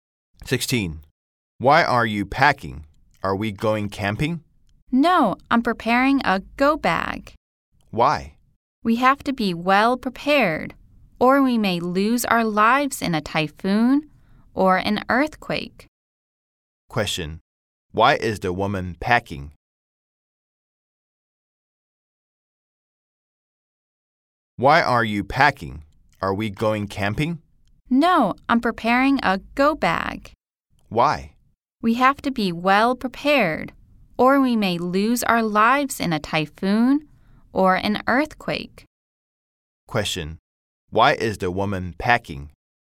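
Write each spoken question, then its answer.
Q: Question: Why is the woman packing?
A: She is preparing a go bag for a typhoon or earthquake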